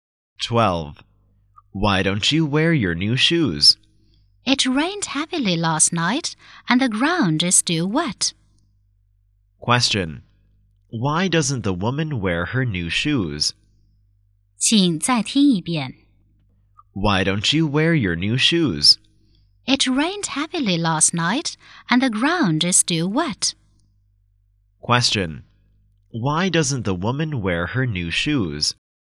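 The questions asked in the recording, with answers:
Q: Why doesn't the woman wear her new shoes?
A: The ground is still wet after heavy rain.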